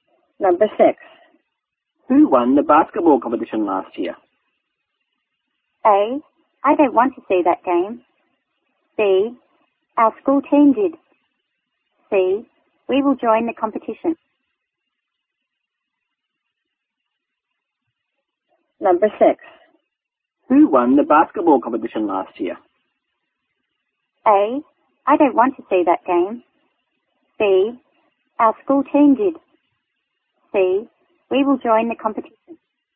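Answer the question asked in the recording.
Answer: B: Our school team did.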